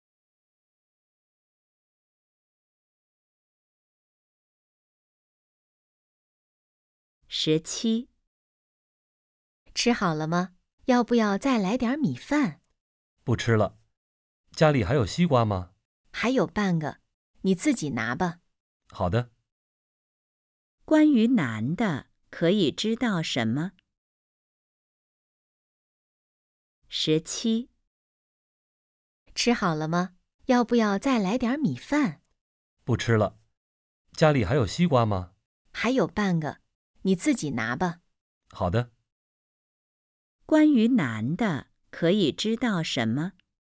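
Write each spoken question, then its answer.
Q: 关于男的,可以知道什么?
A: 想吃西瓜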